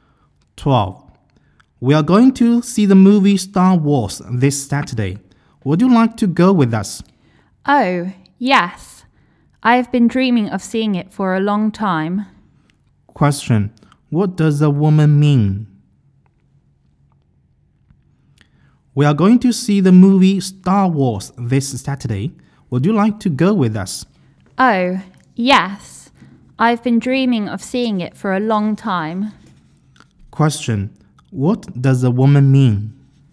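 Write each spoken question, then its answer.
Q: what does the woman mean?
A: She would like to go and see the movie with them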